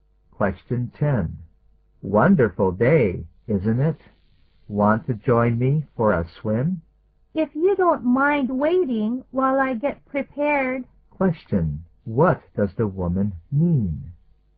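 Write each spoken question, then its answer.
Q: What does the woman mean?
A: She will join him if he waits while she gets ready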